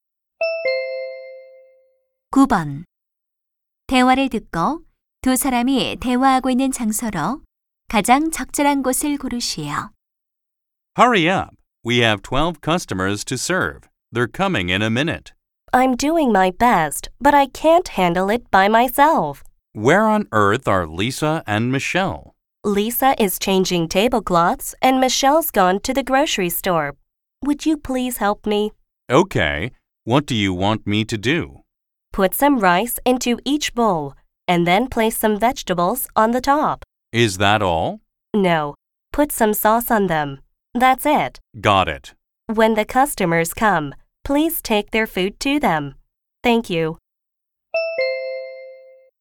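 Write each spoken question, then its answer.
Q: 대화를 듣고 두 사람이 대화하고 있는 장소로 가장 적절한 곳을 고르시오.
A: 식당 주방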